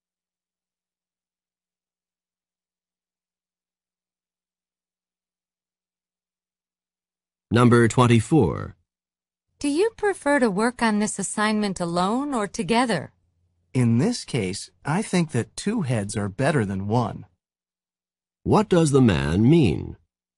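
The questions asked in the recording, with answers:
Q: What does the man mean?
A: They should work together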